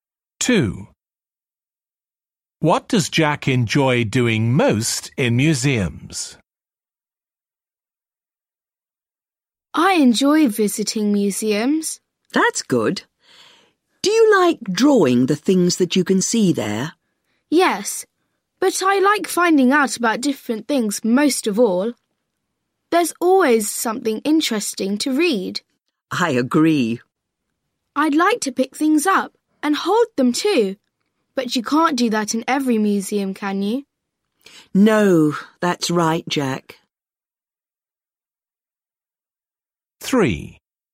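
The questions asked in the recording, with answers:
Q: What does Jack enjoy doing most in museums?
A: finding out about different things (reading)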